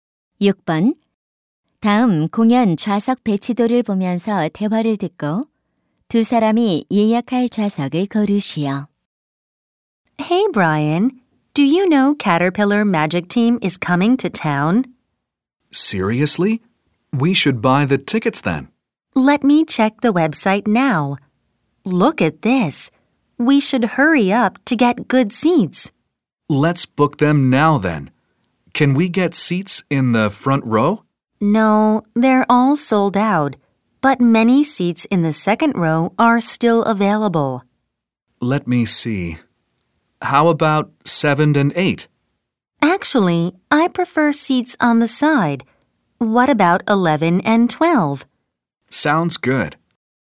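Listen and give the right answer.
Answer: 두 번째 줄 11, 12번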